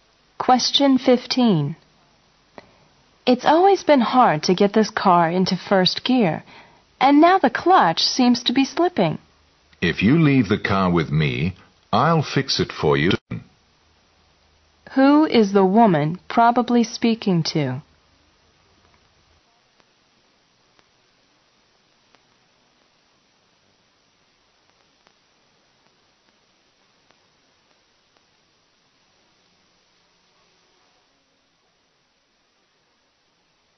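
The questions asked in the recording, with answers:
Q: Who is the woman probably speaking to?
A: A car mechanic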